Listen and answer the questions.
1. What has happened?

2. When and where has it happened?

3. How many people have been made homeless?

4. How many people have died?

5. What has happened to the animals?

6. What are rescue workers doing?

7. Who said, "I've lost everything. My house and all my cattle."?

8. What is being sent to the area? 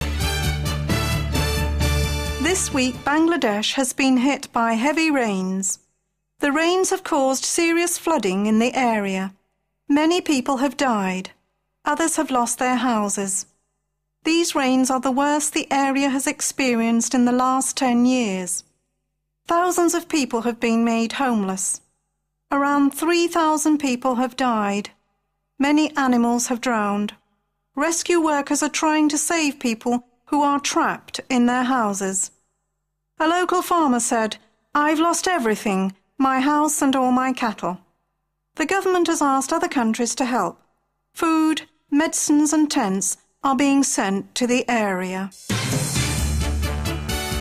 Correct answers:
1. A flood.
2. This week in Bangladesh.
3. Thousands of people have been made homeless.
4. Around 3,000 people have died.
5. Animals have drowned.
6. Rescue workers are trying to save people who are trapped in their houses.
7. A farmer.
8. Food, medicine and tents are being sent.

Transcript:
This week Bangladesh has been hit by heavy rains. The rains have caused serious flooding in the area. Many people have died. Others have lost their houses.
These rains are the worst the area has experienced in the last ten years. Thousands of people have been made homeless. Around 3,000 people have died. Many animals have drowned. Rescue workers are trying to save people who are trapped in their houses.
A local farmer said: "I've lost everything – my house and all my cattle." The government has asked other countries to help. Food, medicines and tents are being sent to the area.